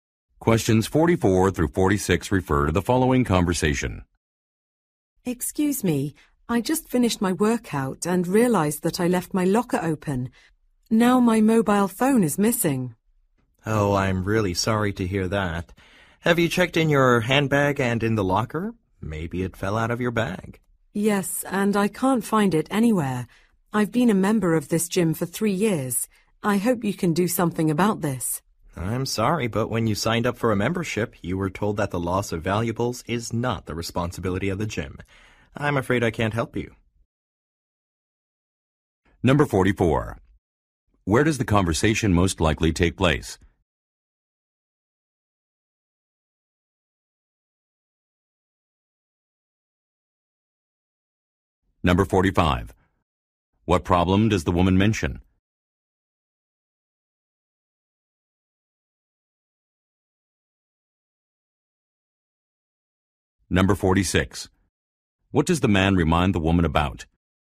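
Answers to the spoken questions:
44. At a gym
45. Her mobile phone is missing
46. The gym is not responsible for lost valuables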